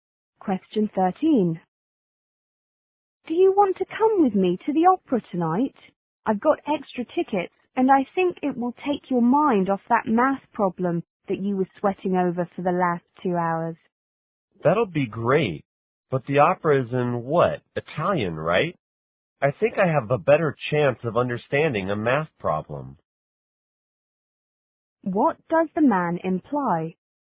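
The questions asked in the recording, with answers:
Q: What does the man imply?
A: He wouldn't understand an opera sung in Italian.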